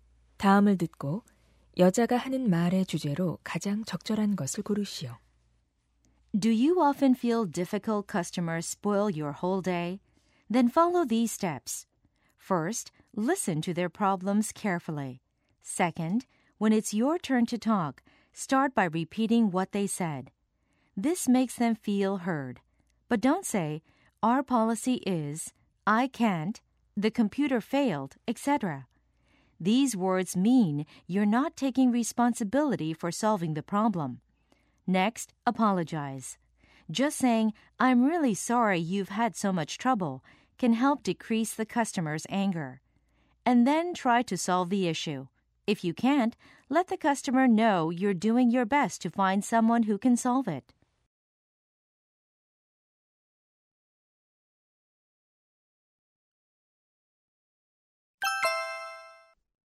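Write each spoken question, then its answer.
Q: 다음을 듣고 여자가 하는 말의 주제로 가장 적절한 것을 고르시오.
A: 까다로운 고객을 응대하는 방법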